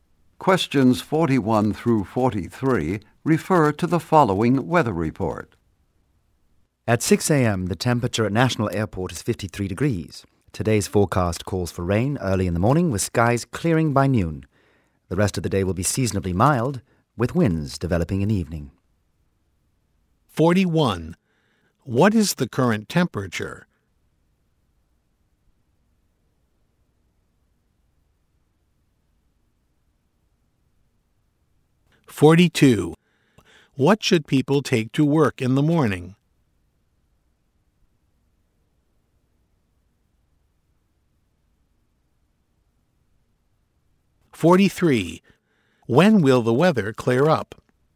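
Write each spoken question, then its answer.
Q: What is the current temperature?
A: 53 degrees

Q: What should people take to work in the morning?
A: An umbrella

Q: When will the weather clear up?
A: By noon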